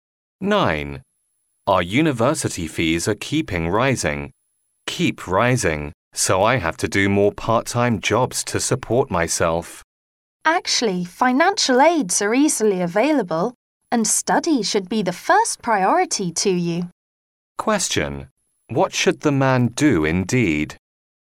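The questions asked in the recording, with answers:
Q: What should the man do indeed?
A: Apply for financial aid and put his studies first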